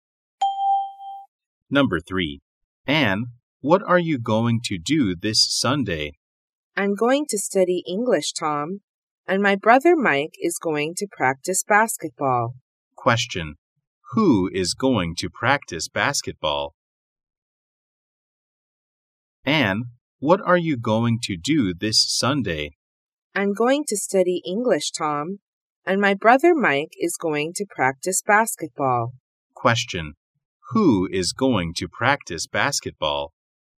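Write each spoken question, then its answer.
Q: Who is going to practice basketball?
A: Mike, Anne's brother.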